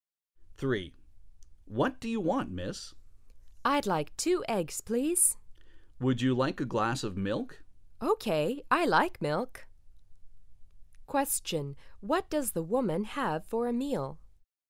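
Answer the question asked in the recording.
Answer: Two eggs and a glass of milk.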